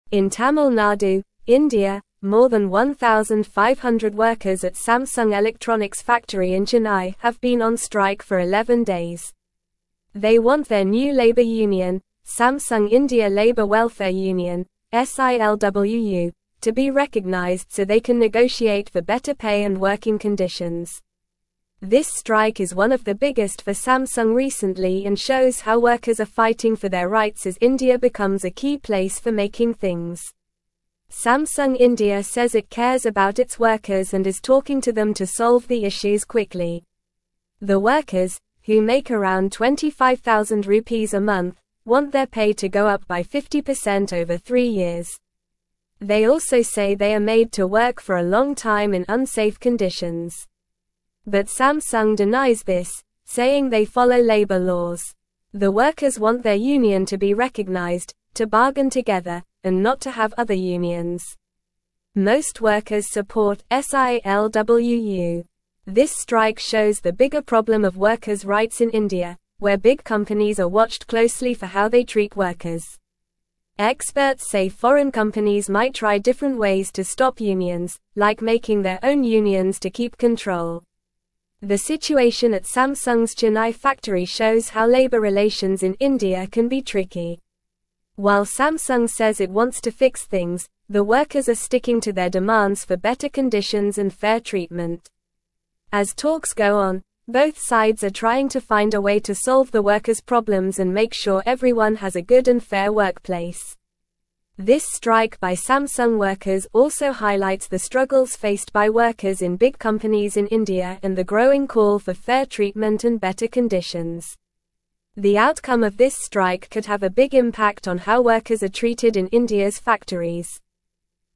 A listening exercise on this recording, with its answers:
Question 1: more than 1,500 workers at (1)______ Electronics'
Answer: Samsung

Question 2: Electronics' (2)______ in Chennai have been on strike for 11 days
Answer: factory

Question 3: Samsung India Labour Welfare (3)______ (SILWU)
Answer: Union

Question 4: negotiate for better pay and (4)______ conditions.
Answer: working

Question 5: Samsung India says it cares about its (5)______ and is talking to them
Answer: workers

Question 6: saying they follow (6)______ laws.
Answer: labor

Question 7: to (7)______ together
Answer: bargain

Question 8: and not to have other (8)______.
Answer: unions

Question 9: like (9)______ their own unions to keep control.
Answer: making

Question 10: The (10)______ at Samsung's Chennai factory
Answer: situation

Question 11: how labor relations in India can be (11)______.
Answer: tricky

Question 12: While Samsung says it (12)______ to fix things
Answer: wants

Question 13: both sides are (13)______ to find a way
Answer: trying

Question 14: to find a way to (14)______ the workers'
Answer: solve

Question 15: the workers' (15)______ and make sure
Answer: problems

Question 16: faced by workers in big (16)______ in India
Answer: companies

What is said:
In Tamil Nadu, India, more than 1,500 workers at Samsung Electronics' factory in Chennai have been on strike for 11 days. They want their new labor union, Samsung India Labour Welfare Union (SILWU), to be recognized so they can negotiate for better pay and working conditions. This strike is one of the biggest for Samsung recently and shows how workers are fighting for their rights as India becomes a key place for making things.
Samsung India says it cares about its workers and is talking to them to solve the issues quickly. The workers, who make around 25,000 rupees a month, want their pay to go up by 50% over three years. They also say they are made to work for a long time in unsafe conditions. But Samsung denies this, saying they follow labor laws.
The workers want their union to be recognized, to bargain together, and not to have other unions. Most workers support SILWU. This strike shows the bigger problem of workers' rights in India, where big companies are watched closely for how they treat workers. Experts say foreign companies might try different ways to stop unions, like making their own unions to keep control.
The situation at Samsung's Chennai factory shows how labor relations in India can be tricky. While Samsung says it wants to fix things, the workers are sticking to their demands for better conditions and fair treatment. As talks go on, both sides are trying to find a way to solve the workers' problems and make sure everyone has a good and fair workplace. This strike by Samsung workers also highlights the struggles faced by workers in big companies in India and the growing call for fair treatment and better conditions. The outcome of this strike could have a big impact on how workers are treated in India's factories.

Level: Level 3